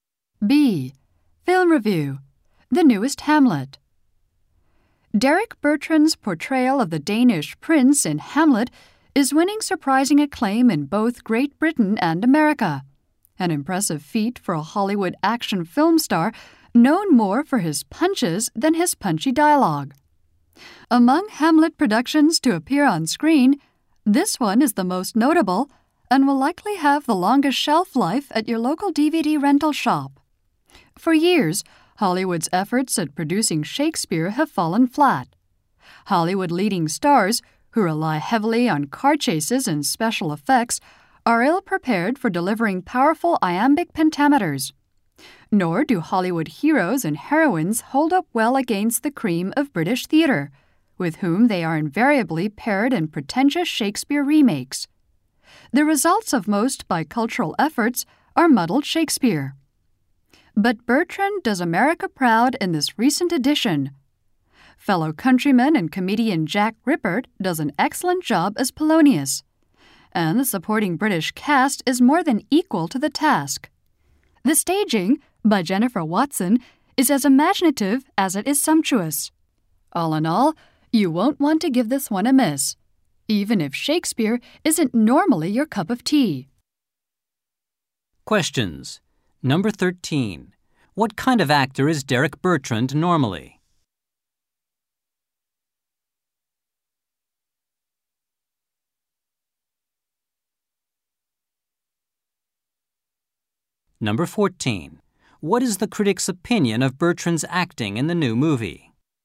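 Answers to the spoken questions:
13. A Hollywood action film star
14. It is very good; he does America proud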